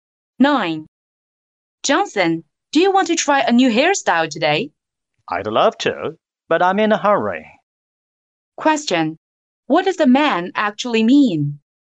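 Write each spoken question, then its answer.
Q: What does the man actually mean?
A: He has no time for a new hairstyle now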